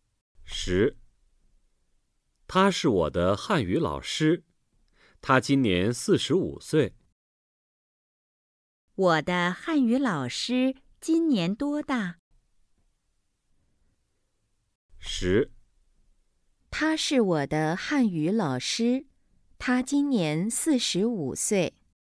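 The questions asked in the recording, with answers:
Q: 我的汉语老师今年多大?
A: 四十五岁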